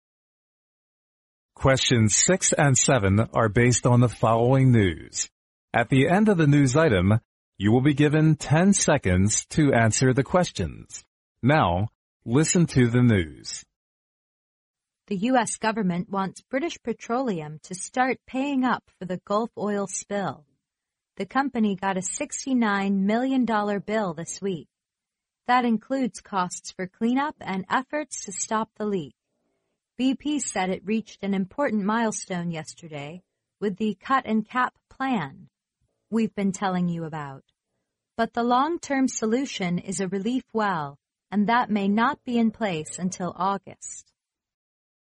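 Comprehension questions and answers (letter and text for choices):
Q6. What does the news item mainly talk about?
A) BP got 69 million dollars from American government.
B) BP reached an "important milestone" in oil industry.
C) BP used the "cut and cap" plan to exploit oil.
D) D. BP starts paying up cleanup and efforts to stop the leak of the Gulf oil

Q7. The British Petroleum may not solve the Gulf oil problem until_____.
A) April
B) August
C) November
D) September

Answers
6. D) D. BP starts paying up cleanup and efforts to stop the leak of the Gulf oil
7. B) August

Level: 英语四级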